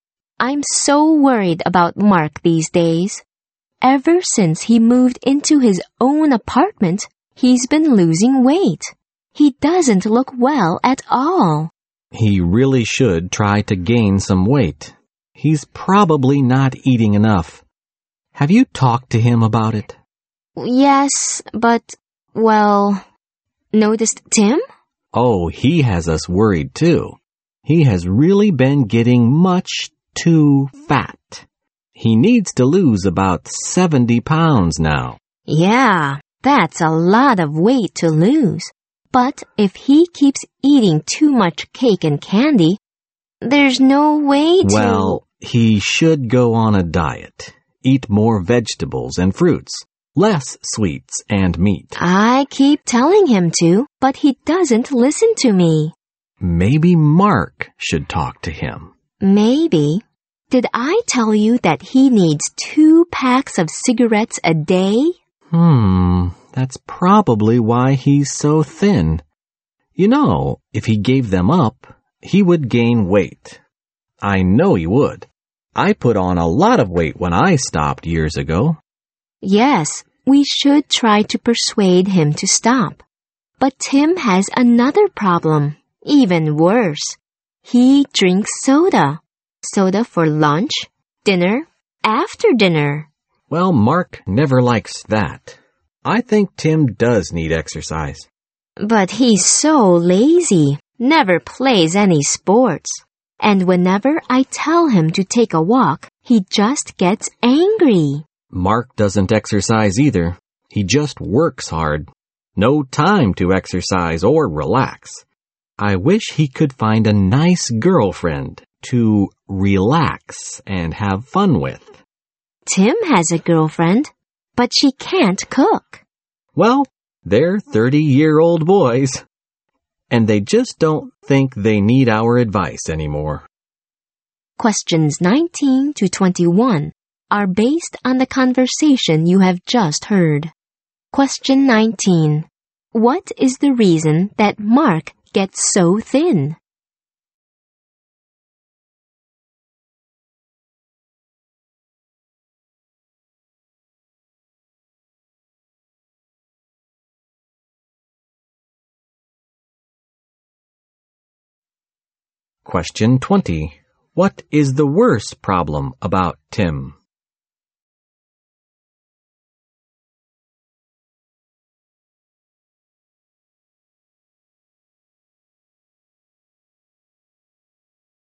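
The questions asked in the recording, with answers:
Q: What is the reason that Mark gets so thin?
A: He smokes 2 packs of cigarettes a day

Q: What is the worst problem about Tim?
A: He drinks soda all the time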